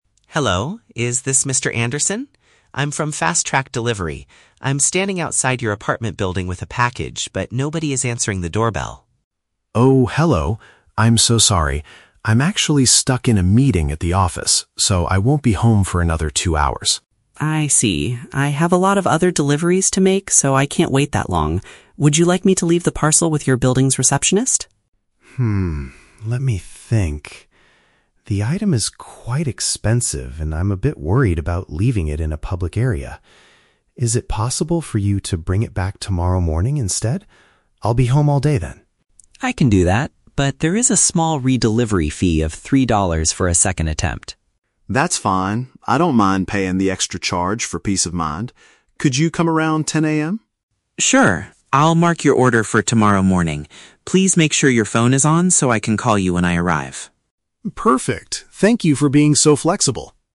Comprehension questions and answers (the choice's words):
Listen to a telephone conversation between a customer and a delivery driver. Choose the best answer (A, B, or C) for each question.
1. Why is the customer unable to receive his package right now?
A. He is currently busy working at his place of business.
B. He is traveling to another city for a two-hour holiday.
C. He forgot his apartment keys inside the building.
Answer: He is currently busy working at his place of business.

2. Why does the customer refuse to leave the parcel at the reception desk?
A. The receptionist is currently not at the desk to accept it.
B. He is concerned about the safety of his high-priced item.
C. The building does not allow deliveries to be left in the lobby.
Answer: He is concerned about the safety of his high-priced item.

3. What is the final agreement between the two men?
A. The shipper will leave the package outside the apartment door for free.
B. The customer will pick up the parcel from the delivery office tonight.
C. The shipper will return the next day and collect an additional fee.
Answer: The shipper will return the next day and collect an additional fee.

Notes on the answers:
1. The customer says, "I'm actually stuck in a meeting at the office." Option A paraphrases this as "busy working at his place of business."
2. The customer states, "The item is quite expensive, and I'm a bit worried about leaving it in a public area." Option B uses synonyms: "concerned about the safety" (worried) and "high-priced item" (expensive).
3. The shipper agrees to bring it back "tomorrow morning" and mentions a "re-delivery fee of three dollars." Option C paraphrases this as returning "the next day" and collecting an "additional fee."

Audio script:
I'm standing outside your apartment building with a package, but nobody is answering the doorbell.
Customer: Oh, hello! I'm so sorry. I'm actually stuck in a meeting at the office, so I won't be home for another two hours.
Shipper: I see. I have a lot of other deliveries to make, so I can't wait that long. Would you like me to leave the parcel with your building's receptionist?
Customer: Hmm, let me think. The item is quite expensive, and I'm a bit worried about leaving it in a public area. Is it possible for you to bring it back tomorrow morning instead? I'll be home all day then.
Shipper: I can do that, but there is a small "re-delivery" fee of three dollars for a second attempt.
Customer: That's fine, I don't mind paying the extra charge for peace of mind.
Shipper: Sure. I'll mark your order for tomorrow morning. Please make sure your phone is on so I can call you when I arrive.